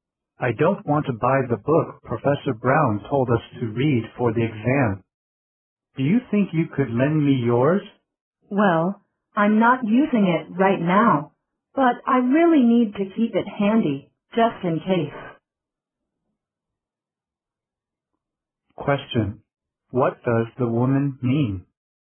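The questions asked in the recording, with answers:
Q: What does the woman mean?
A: She is reluctant to lend her book; she needs to keep it handy.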